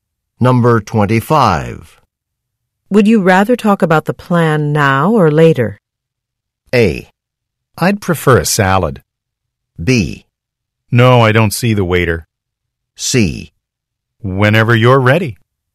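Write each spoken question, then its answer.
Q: Would you rather talk about the plan now or later?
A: C: Whenever you're ready.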